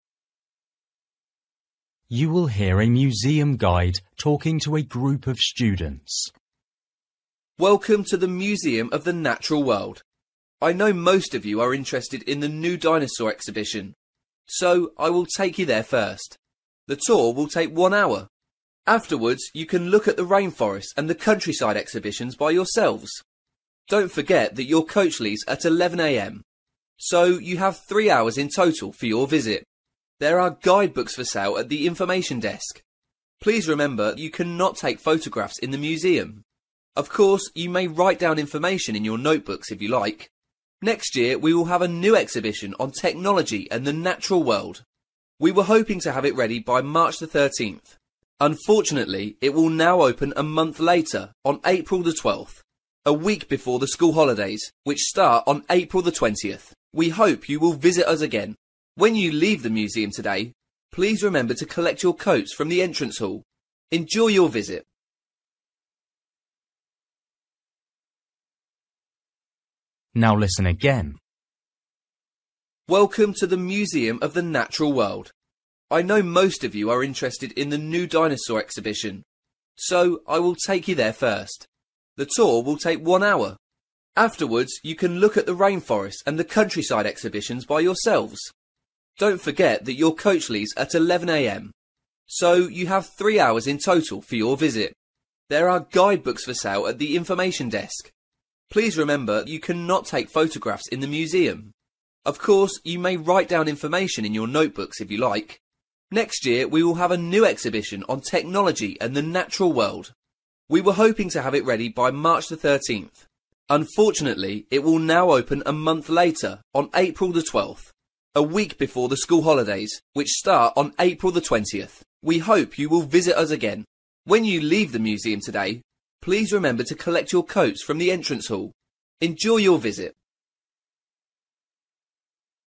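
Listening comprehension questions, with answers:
For each question, write the correct answer in the gap. Write one word or a number or a date or a time.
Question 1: Time to leave museum: (1) am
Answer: 11

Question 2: Available at information desk: (2)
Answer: guidebooks

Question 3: Don't take: (3)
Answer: photographs

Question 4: Holidays start: (4)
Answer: April 20th

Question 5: Don't forget your: (5)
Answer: coats

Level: Luyện nghe trình độ A2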